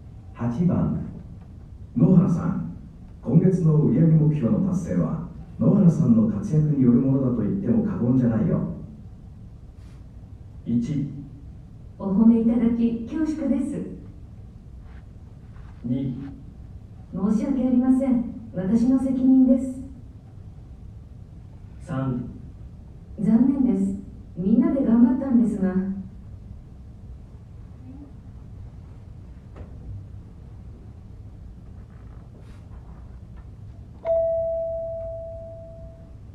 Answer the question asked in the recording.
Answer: 1

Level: N1 Listening · Test 2